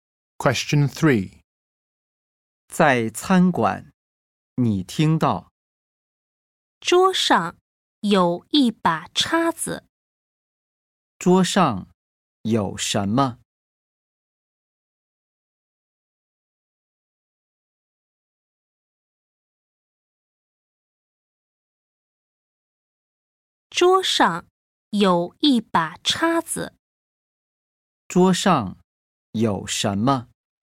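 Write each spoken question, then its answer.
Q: 桌上有什么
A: 一把叉子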